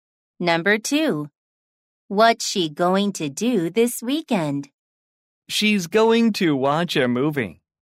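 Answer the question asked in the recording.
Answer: watch a movie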